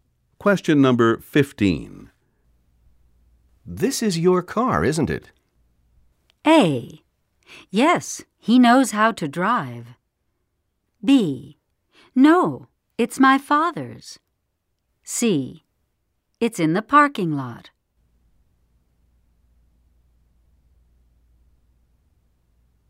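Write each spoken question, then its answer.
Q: This is your car, isn't it?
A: B: No, it's my father's.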